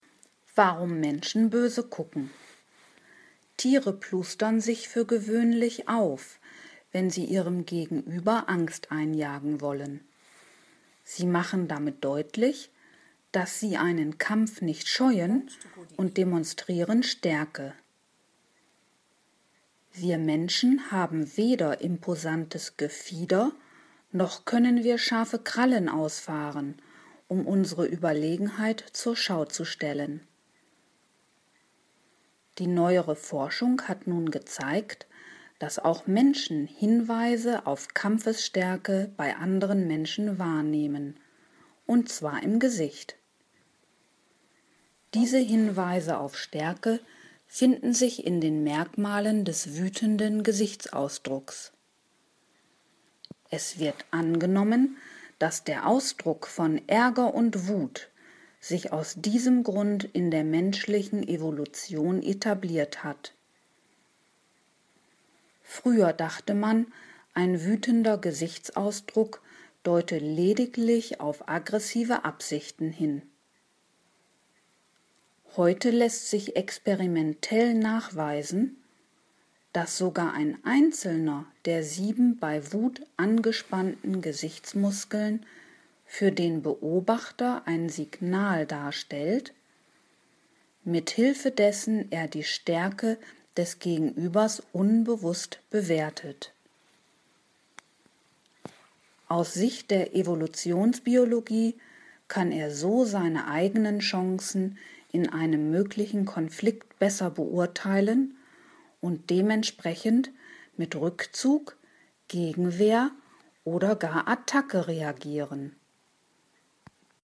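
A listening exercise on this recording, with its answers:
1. Tiere plustern sich auf, weil sie dann besonders schön aussehen.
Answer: Falsch

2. Auch Menschen nehmen Signale, die auf Kampfesstärke hindeuten, bei anderen Menschen wahr.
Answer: Richtig

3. Neue Forschungen zeigen, dass bei der Einschätzung der Stärke des Gegenübers der Gesichtsausdruck eine tragende Rolle spielt.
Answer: Richtig

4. Merkmale der Stärke lassen sich laut Text in jedem beliebigen Gesichtsausdruck finden.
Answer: Falsch

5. Einen Zusammenhang zwischen menschlicher Evolution und der Etablierung eines wütenden Gesichtsausdrucks als Stärke-Merkmal hält die Forschung für abwegig.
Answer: Falsch

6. In der Vergangenheit dachte man, dass der Ausdruck von Wut im Gesicht lediglich auf Aggressivität hindeute.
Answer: Richtig

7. Die sieben verschiedenen Gesichtsmuskeln, die bei Wut angespannt werden, können vom Betrachter nur in ihrer Gesamtheit als Ausdruck von Stärke interpretiert werden.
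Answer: Falsch

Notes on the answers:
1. Sie stellen Gefieder oder Krallen zur Schau, weil sie Stärke demonstrieren wollen.
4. Der wütende, ärgerliche Gesichtsausdruck lässt auf diese Eigenschaften schließen.
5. Dieser Zusammenhang wird heute angenommen.
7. Durch Experimente konnte man nachweisen, dass schon ein einzelner dieser angespannten Gesichtsmuskeln beim Betrachter ein Signal darstellt, mit dessen Hilfe er die Stärke des Gegenübers unbewusst beurteilt.

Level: C (schwer)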